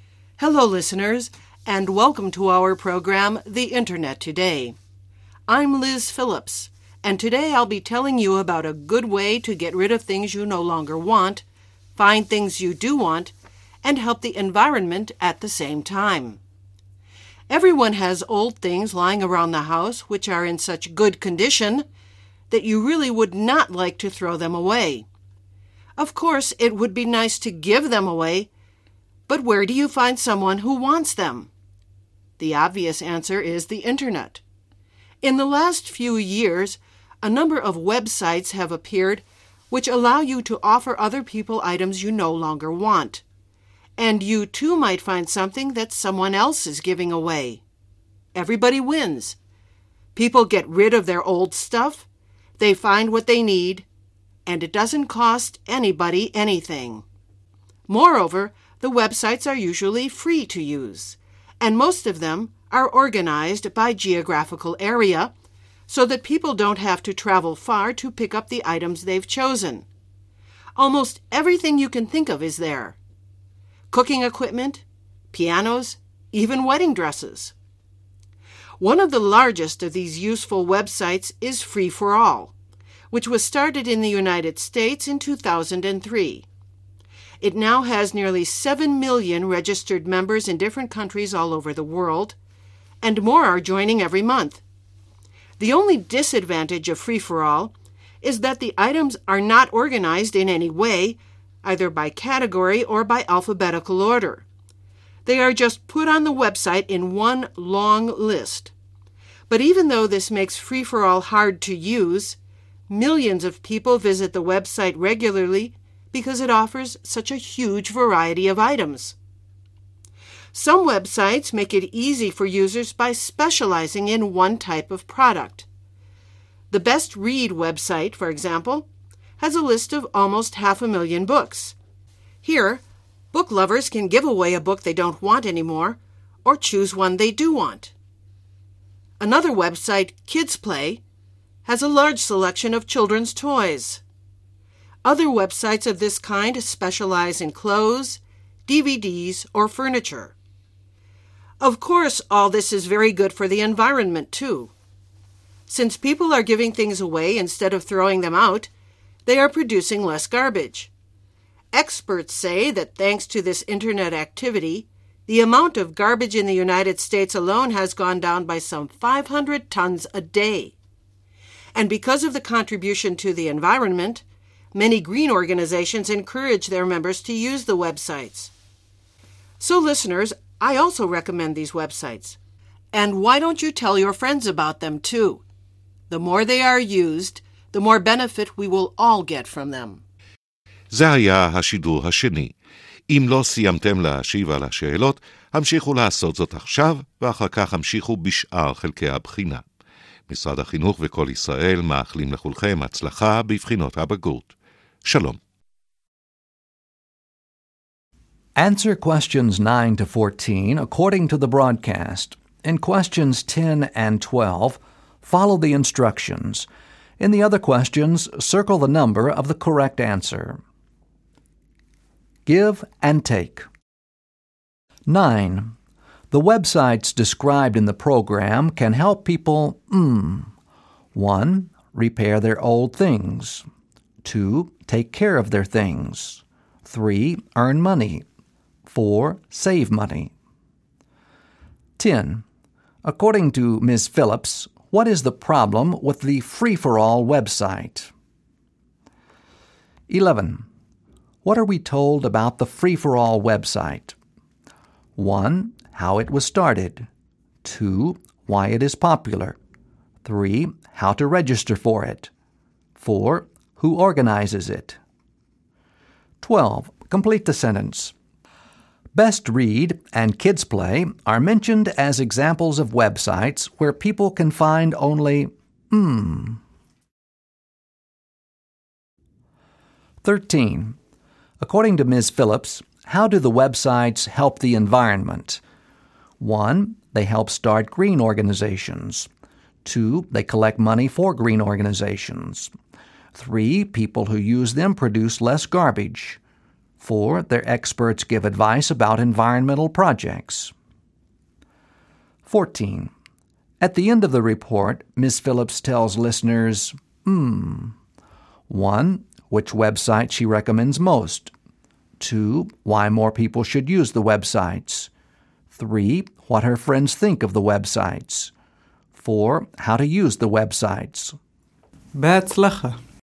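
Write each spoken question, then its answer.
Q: The websites described in the program can help people 1.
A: 4: Save money.

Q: According to Ms. Phillips, what is the problem with the free-for-all website?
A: The items are not organized in any way, just one long list

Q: What are we told about the free-for-all website?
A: 2: Why it is popular.

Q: Best Read and Kids Play are mentioned as examples of websites where people can find only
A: one type of product

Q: According to Ms. Phillips, how do the websites help the environment?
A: 3: People who use them produce less garbage.

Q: At the end of the report, Ms.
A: 2: Why more people should use the websites.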